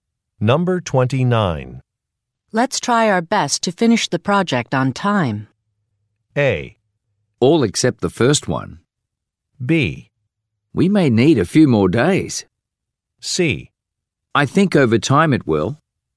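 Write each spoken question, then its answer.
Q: Let's try our best to finish the project on time.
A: B: We may need a few more days.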